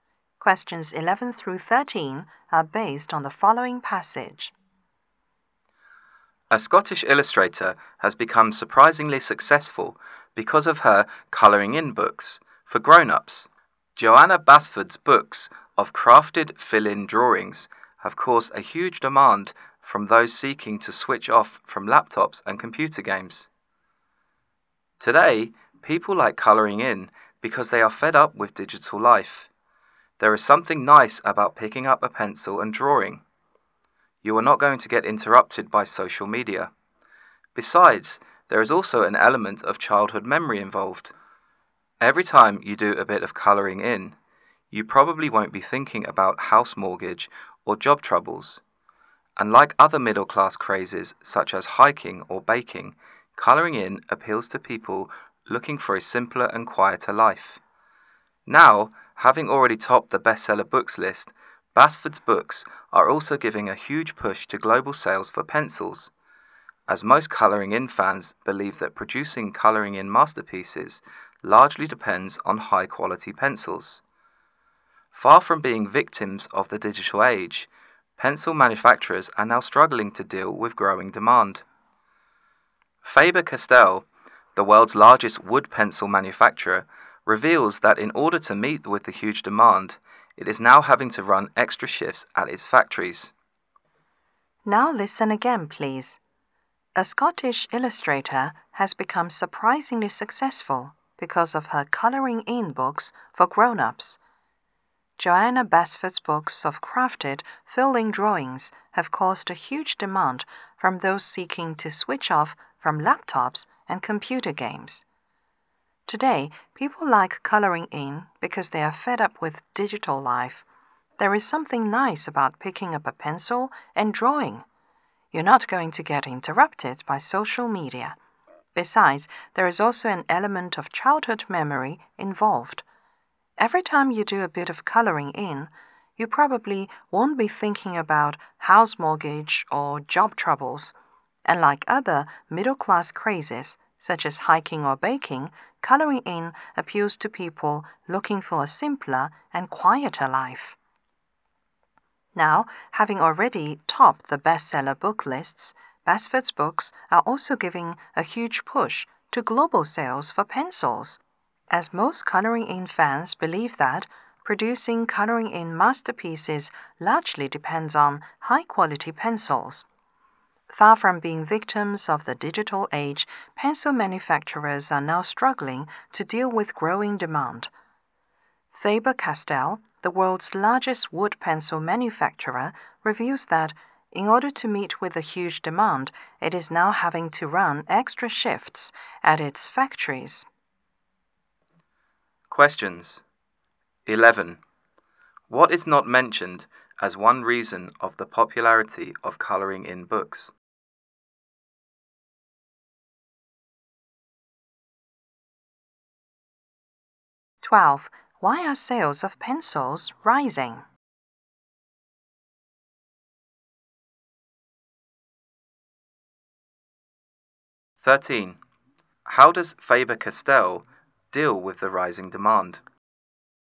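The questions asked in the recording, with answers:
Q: Why are sales of pencils rising?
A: Colouring-in fans believe high-quality pencils are needed to make good colouring-in work.

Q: How does Faber-Castell deal with the rising demand?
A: It is running extra shifts at its factories.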